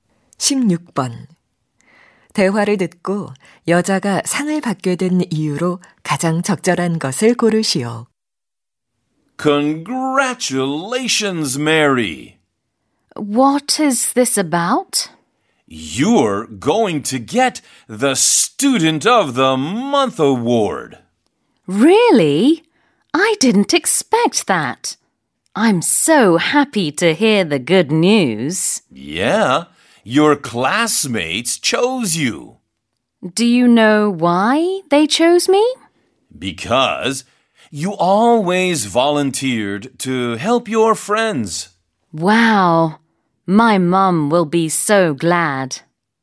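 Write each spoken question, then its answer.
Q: 대화를 듣고 여자가 상을 받게 된 이유로 가장 적절한 것을 고르시오.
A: 항상 자진해서 친구들을 도와서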